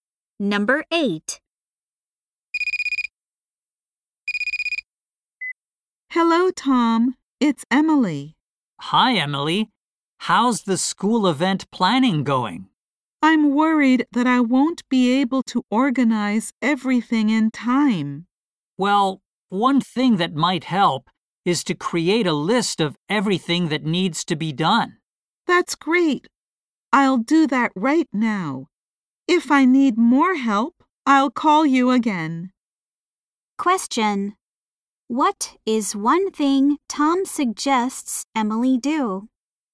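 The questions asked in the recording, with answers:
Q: What is one thing Tom suggests Emily do?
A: Make a list of everything that needs to be done.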